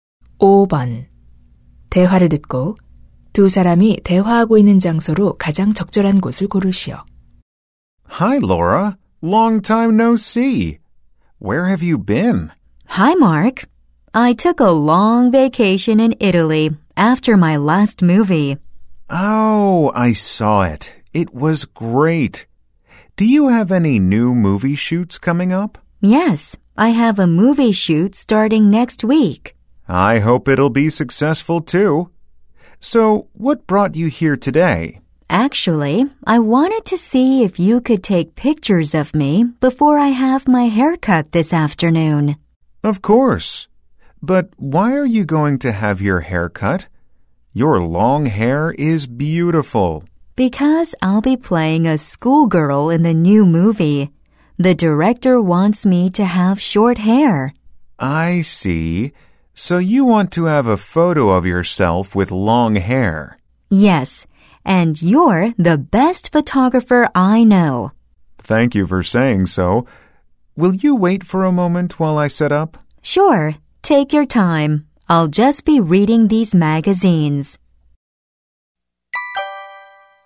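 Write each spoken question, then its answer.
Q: 대화를 듣고 두 사람이 대화하고 있는 장소로 가장 적절한 곳을 고르시오.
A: 사진관(사진 스튜디오)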